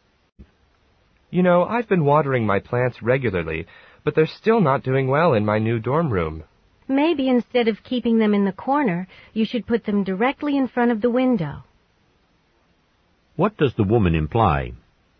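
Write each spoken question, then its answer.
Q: What does the woman imply?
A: The plants need more sunlight; he should put them in front of the window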